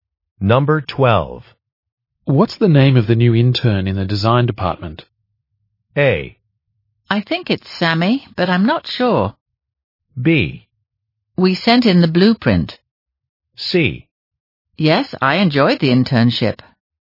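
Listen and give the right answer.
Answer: A: I think it's Sammy, but I'm not sure.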